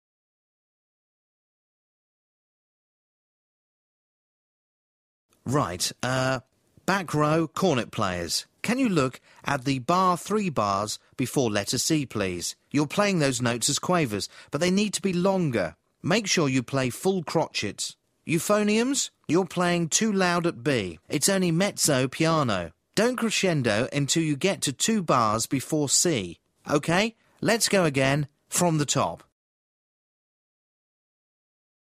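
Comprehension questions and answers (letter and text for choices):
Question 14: Who is speaking?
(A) A conductor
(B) A lawyer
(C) A doctor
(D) A school teacher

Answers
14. (A) A conductor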